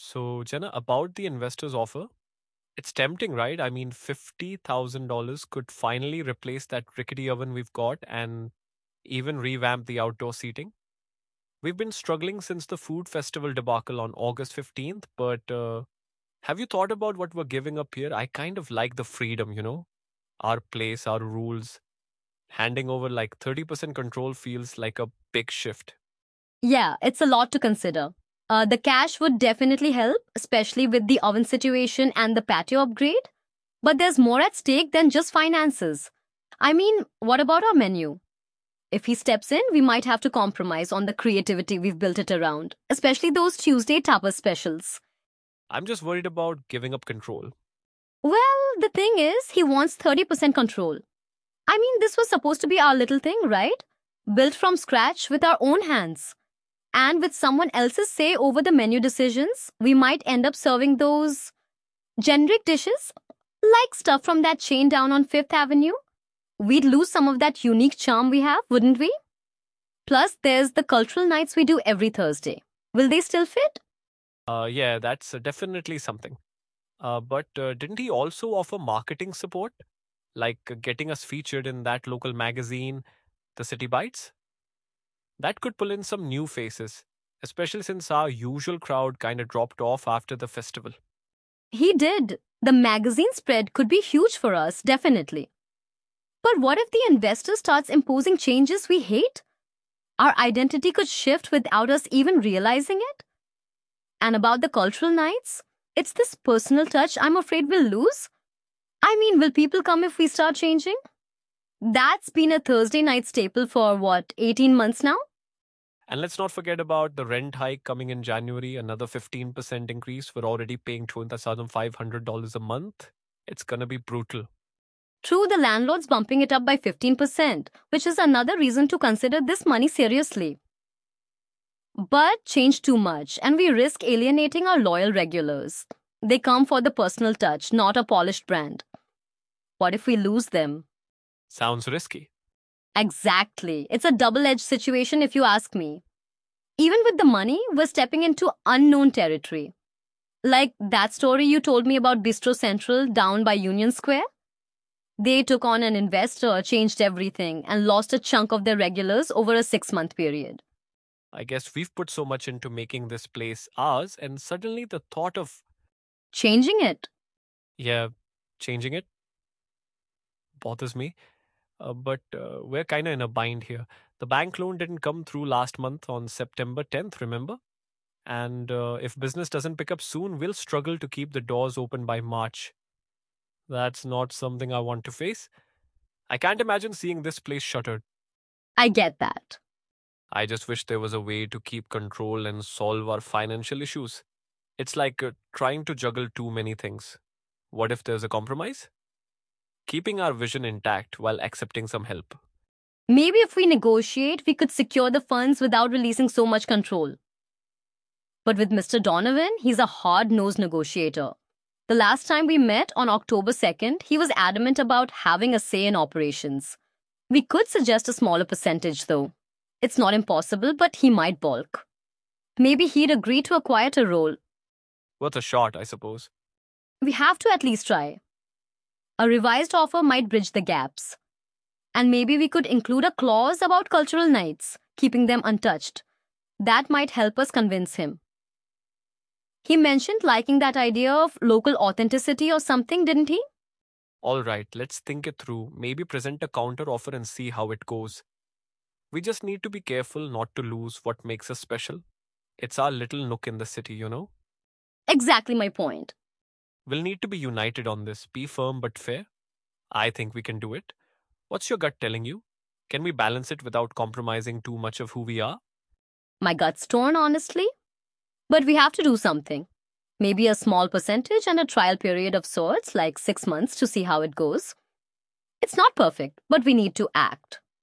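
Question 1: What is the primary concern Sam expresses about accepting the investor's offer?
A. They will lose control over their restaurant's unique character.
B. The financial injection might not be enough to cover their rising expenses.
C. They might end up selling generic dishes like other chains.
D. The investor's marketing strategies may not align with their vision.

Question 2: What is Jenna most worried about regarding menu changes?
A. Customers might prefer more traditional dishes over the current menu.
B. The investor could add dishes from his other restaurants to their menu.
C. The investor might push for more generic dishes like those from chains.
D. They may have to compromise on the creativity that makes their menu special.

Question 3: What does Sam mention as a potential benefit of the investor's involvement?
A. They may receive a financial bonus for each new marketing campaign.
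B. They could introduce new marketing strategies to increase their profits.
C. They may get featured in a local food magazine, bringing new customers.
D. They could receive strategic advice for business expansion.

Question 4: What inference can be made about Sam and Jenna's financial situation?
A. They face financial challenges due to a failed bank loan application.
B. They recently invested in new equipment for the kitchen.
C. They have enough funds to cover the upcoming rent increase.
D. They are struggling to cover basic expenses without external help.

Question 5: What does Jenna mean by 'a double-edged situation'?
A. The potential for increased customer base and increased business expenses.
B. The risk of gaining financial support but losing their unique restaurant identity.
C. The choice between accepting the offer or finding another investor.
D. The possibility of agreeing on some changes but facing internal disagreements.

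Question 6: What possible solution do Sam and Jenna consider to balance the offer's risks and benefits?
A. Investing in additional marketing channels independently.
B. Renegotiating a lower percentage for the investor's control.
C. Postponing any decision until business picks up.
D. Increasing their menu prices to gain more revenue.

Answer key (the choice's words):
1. They will lose control over their restaurant's unique character.
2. They may have to compromise on the creativity that makes their menu special.
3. They may get featured in a local food magazine, bringing new customers.
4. They face financial challenges due to a failed bank loan application.
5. The risk of gaining financial support but losing their unique restaurant identity.
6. Renegotiating a lower percentage for the investor's control.

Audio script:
Sam: So, Jenna, about the investor's offer... It's tempting, right? I mean, $50,000 could finally replace that rickety oven we've got and even revamp the outdoor seating. 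We've been struggling since the food festival debacle on August 15th. But, uh, have you thought about what we're giving up here? I kind of like the freedom, you know? Our place, our rules. Handing over, like, 30% control feels like a big shift.
Jenna: Yeah, it's a lot to consider. The cash would definitely help, especially with the oven situation and the patio upgrade. But there's more at stake than just finances. I mean, what about our menu? If he steps in, we might have to compromise on the creativity we've built it around, especially those Tuesday tapas specials.
Sam: I'm just worried about giving up control.
Jenna: Well, the thing is, he wants 30% control. I mean, this was supposed to be our little thing, right? Built from scratch with our own hands. And with someone else's say over the menu decisions, we might end up serving those... generic dishes, like stuff from that chain down on 5th Avenue. 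We'd lose some of that unique charm we have, wouldn't we? Plus, there's the cultural nights we do every Thursday. Will they still fit?
Sam: Yeah, that's definitely something. But didn't he also offer marketing support? Like, getting us featured in that local magazine, 'The City Bites'? That could pull in some new faces, especially since our usual crowd kinda dropped off after the festival.
Jenna: He did. The magazine spread could be huge for us, definitely. But what if the investor starts imposing changes we hate? Our identity could shift without us even realizing it. And about the cultural nights... it's this personal touch I'm afraid we'll lose. I mean, will people come if we start changing? That's been a Thursday night staple for, what, 18 months now?
Sam: And let's not forget about the rent hike coming in January, another 15% increase. We're already paying $2,500 a month. It's gonna be brutal.
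Jenna: True, the landlord's bumping it up by 15%, which is another reason to consider this money seriously. But change too much, and we risk alienating our loyal regulars. They come for the personal touch, not a polished brand. What if we lose them?
Sam: Sounds risky.
Jenna: Exactly! It's a double-edged situation if you ask me. Even with the money, we're stepping into unknown territory. Like, that story you told me about 'Bistro Central' down by Union Square. They took on an investor, changed everything, and lost a chunk of their regulars over a six-month period.
Sam: I guess we've put so much into making this place ours, and suddenly the thought of—
Jenna: Changing it?
Sam: Yeah, changing it... bothers me. But, we're kinda in a bind here. The bank loan didn't come through last month on September 10th, remember? And if business doesn't pick up soon, we'll struggle to keep the doors open by March. 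That's not something I want to face. I can't imagine seeing this place shuttered.
Jenna: I get that.
Sam: I just wish there was a way to keep control and solve our financial issues. It's like trying to juggle too many things. What if there's a compromise? Keeping our vision intact while accepting some help?
Jenna: Maybe if we negotiate, we could secure the funds without releasing so much control. But with Mr. Donovan, he's a hard-nosed negotiator. The last time we met, on October 2nd, he was adamant about having a say in operations. We could suggest a smaller percentage, though. It's not impossible, but he might balk. Maybe he'd agree to a quieter role.
Sam: Worth a shot, I suppose.
Jenna: We have to at least try. A revised offer might bridge the gaps. And maybe we could include a clause about cultural nights, keeping them untouched. That might help us convince him. He mentioned liking that idea of 'local authenticity' or something, didn't he?
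Sam: Alright, let's think it through. Maybe present a counter-offer and see how it goes. We just need to be careful not to lose what makes us special. It's our little nook in the city, you know?
Jenna: Exactly my point!
Sam: We'll need to be united on this, be firm but fair. I think we can do it. What's your gut telling you? Can we balance it without compromising too much of who we are?
Jenna: My gut's torn, honestly. But we have to do something. Maybe a small percentage and a trial period of sorts, like six months, to see how it goes. It's not perfect, but we need to act.

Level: C1 Advanced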